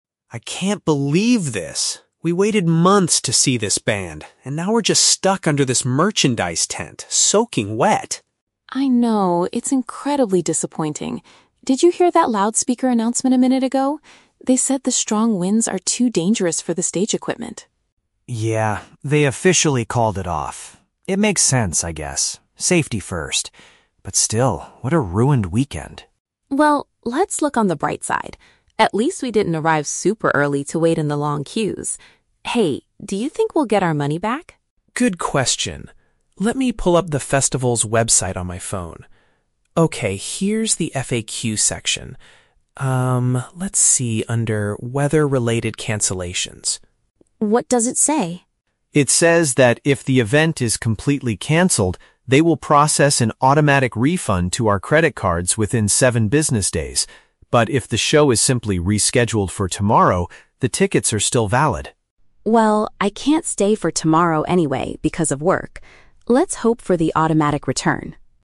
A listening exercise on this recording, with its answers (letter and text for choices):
Listen to a conversation between two friends taking shelter from a storm at an outdoor festival. Choose the correct answer (A, B, or C) for each question.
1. Why was the outdoor concert officially canceled?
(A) Because the severe weather conditions threatened the technical setup.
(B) Because the members of the main band were trapped in the heavy rain.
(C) Because the organizers failed to sell enough tickets for the weekend.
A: (A) Because the severe weather conditions threatened the technical setup.

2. What positive point does the woman make about their situation?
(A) They managed to find a dry tent to sleep in for the entire night.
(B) They did not waste extra time standing in a line earlier in the day.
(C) They got to meet some of the musicians before the storm started.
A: (B) They did not waste extra time standing in a line earlier in the day.

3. What will happen regarding their tickets according to the website?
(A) The cost will be directly returned to their bank accounts if the show isn't moved to the next day.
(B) The attendees must submit a refund application online within the next seven business days.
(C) The tickets can be exchanged for a different music festival happening later this year.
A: (A) The cost will be directly returned to their bank accounts if the show isn't moved to the next day.

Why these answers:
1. Emma mentions that the "strong winds are too dangerous for the stage equipment." Option (A) perfectly paraphrases this ("severe weather conditions" = strong winds, "technical setup" = stage equipment). Option (B) is a trap; "band" and "wet/rain" are mentioned, but the band members were not trapped in the rain. Option (C) is a plausible guess for a canceled event but is never mentioned.
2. Emma says, "At least we didn't arrive super early to wait in the long queues." Option (B) uses synonyms to express this idea ("standing in a line" = wait in the long queues). Option (A) is a trap; they are standing under a "tent" to stay dry, but they are not sleeping there for the night. Option (C) is never mentioned.
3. Tom reads that there is an "automatic refund to our credit cards" (cost directly returned to bank accounts) UNLESS the show is "rescheduled for tomorrow" (moved to the next day). Option (B) is a trap; "seven business days" is mentioned, but the refund is "automatic"—they do not need to submit an application. Option (C) is a logical guess for ticketing policies but is not stated in the audio.

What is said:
Tom: I can't believe this. We waited months to see this band, and now we're just stuck under this merchandise tent, soaking wet.
Emma: I know, it's incredibly disappointing. Did you hear that loudspeaker announcement a minute ago? They said the strong winds are too dangerous for the stage equipment.
Tom: Yeah, they officially called it off. It makes sense, I guess. Safety first. But still, what a ruined weekend.
Emma: Well, let's look on the bright side. At least we didn't arrive super early to wait in the long queues. Hey, do you think we'll get our money back?
Tom: Good question. Let me pull up the festival's website on my phone... Okay, here's the FAQ section. let's see under "Weather-related cancellations."
Emma: What does it say?
Tom: It says that if the event is completely canceled, they will process an automatic refund to our credit cards within seven business days. But if the show is simply rescheduled for tomorrow, the tickets are still valid.
Emma: Well, I can't stay for tomorrow anyway because of work. Let's hope for the automatic return.